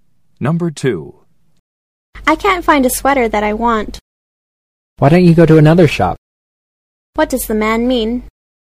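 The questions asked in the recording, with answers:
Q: What does the man mean?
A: She should look in another shop.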